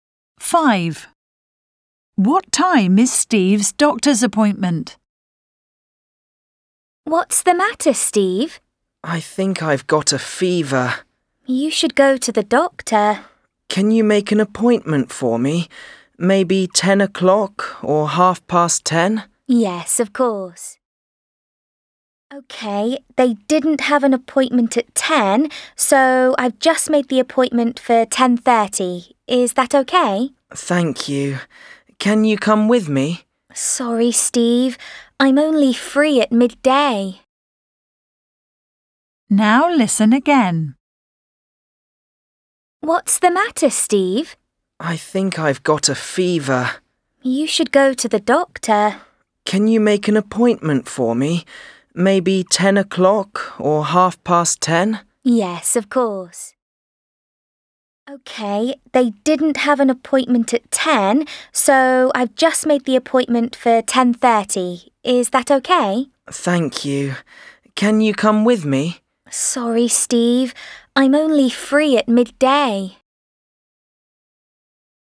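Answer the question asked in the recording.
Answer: 10:30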